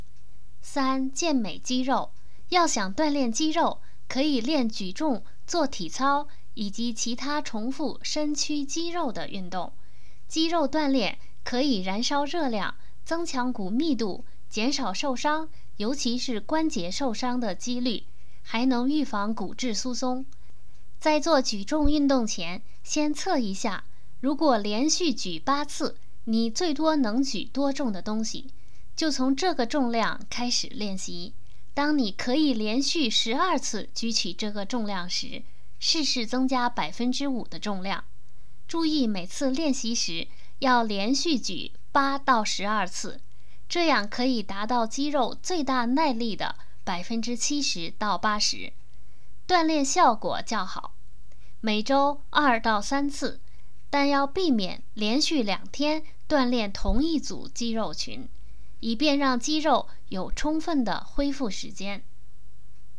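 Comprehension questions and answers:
Please answer the following questions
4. 练习举重应该注意什么?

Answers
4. 从能连续举八次的最大重量开始,能连续举12次时增加5%重量;每次连续举8到12次;每周2到3次,避免连续2天锻炼同一组肌肉群

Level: 3rd Year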